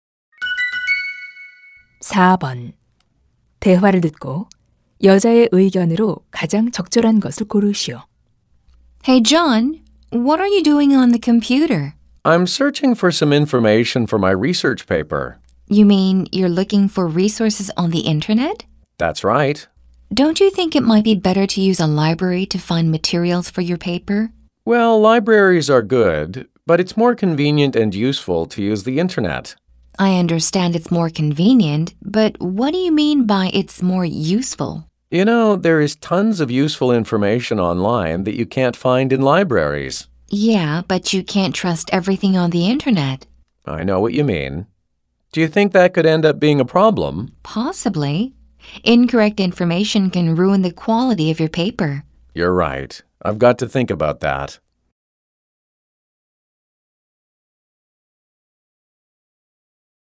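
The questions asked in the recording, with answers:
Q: 대화를 듣고 여자의 의견으로 가장 적절한 것을 고르시오.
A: 인터넷 정보는 모두 신뢰할 수 없으므로 주의해야 한다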